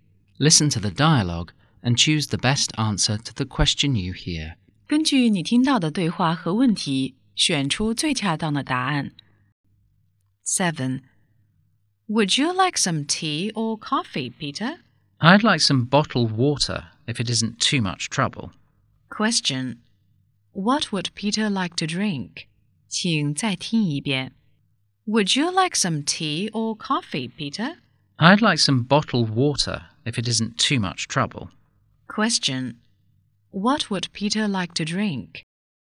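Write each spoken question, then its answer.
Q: What would Peter like to drink?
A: Bottled water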